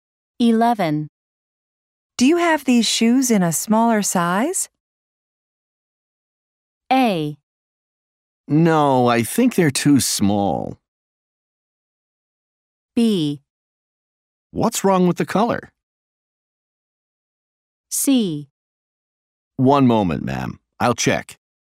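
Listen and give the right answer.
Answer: C: One moment, ma'am. I'll check.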